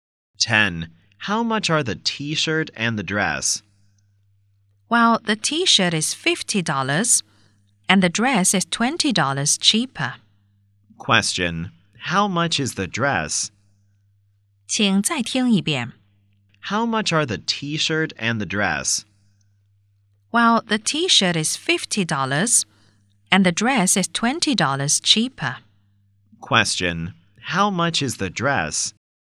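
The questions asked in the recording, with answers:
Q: how much is the dress?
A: $30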